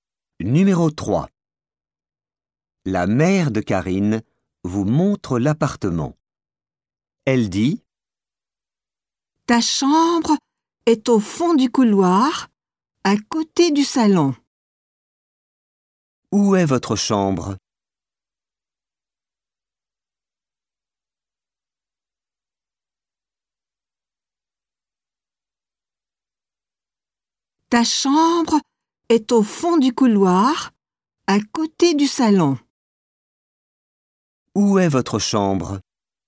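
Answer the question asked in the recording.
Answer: Au fond du couloir, à côté du salon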